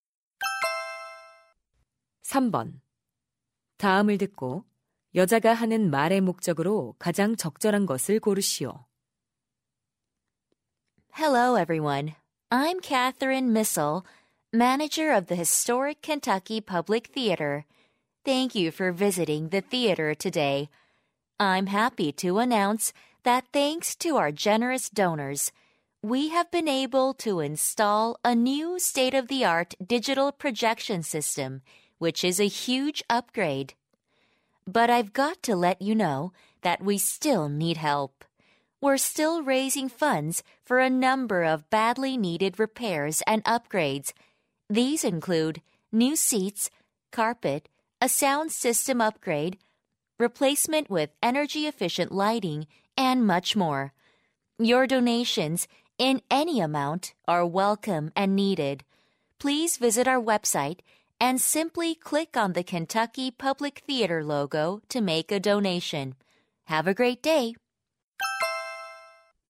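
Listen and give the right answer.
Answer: 극장 수리와 개선을 위한 기부를 요청하려고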